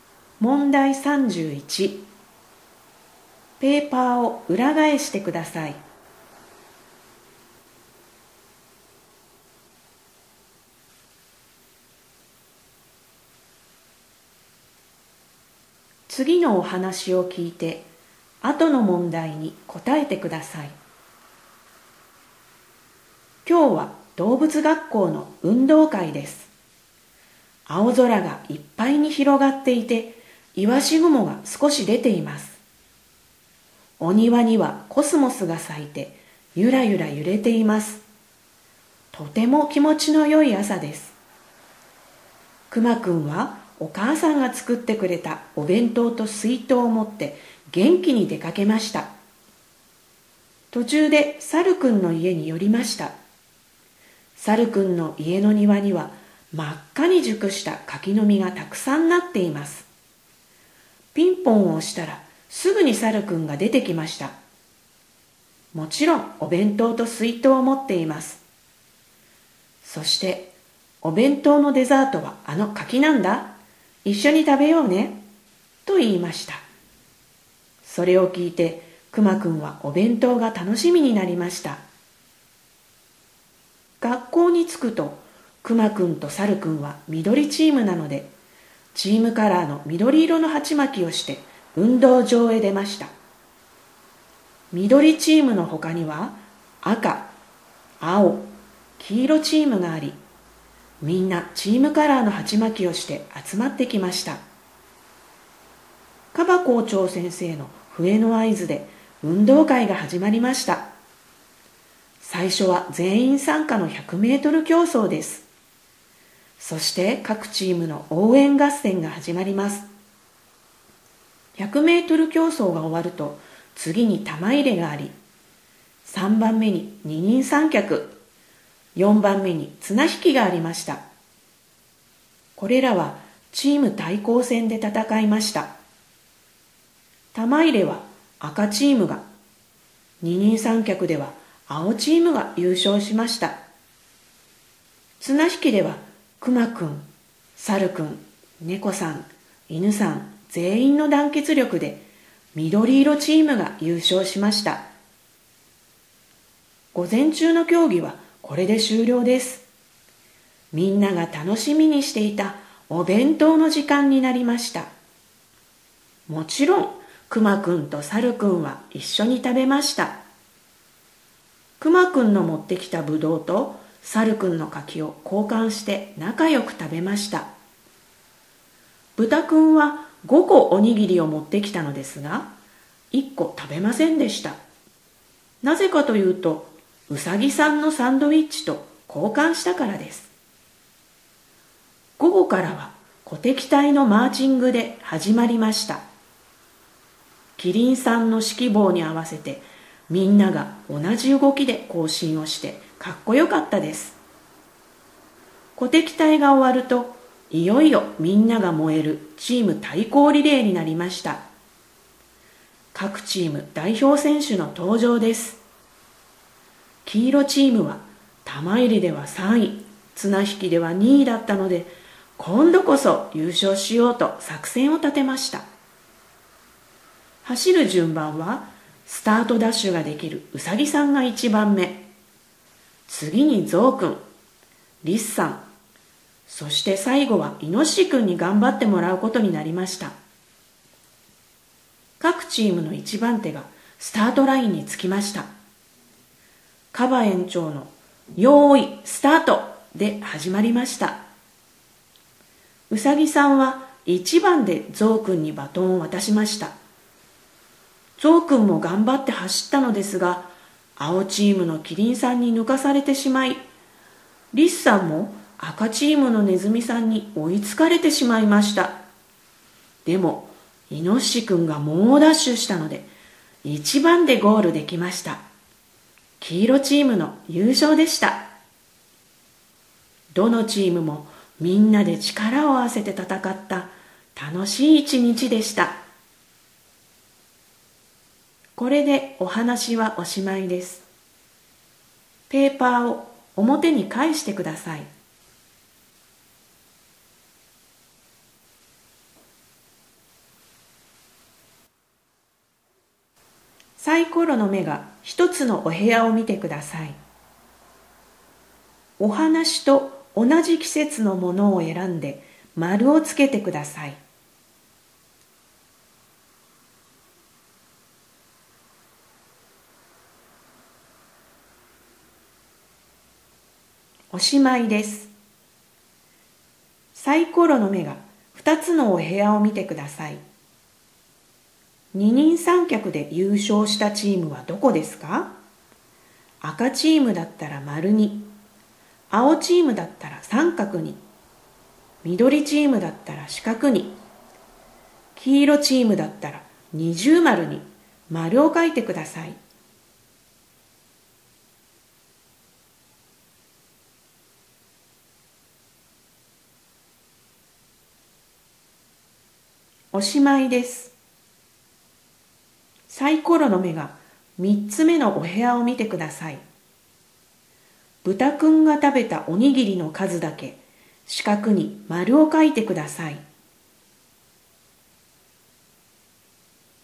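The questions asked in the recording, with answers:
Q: 二人三脚で優勝したチームはどこですか?赤チームだったら丸に、青チームだったら三角に、緑チームだったら四角に、黄色チームだったら二重丸に丸を書いてください。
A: 青チーム(三角)

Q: 豚くんが食べたおにぎりの数だけ四角に丸を書いてください。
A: 4個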